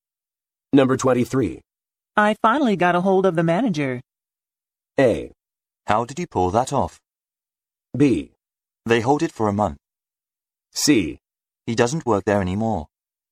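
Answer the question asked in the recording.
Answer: A: How did you pull that off?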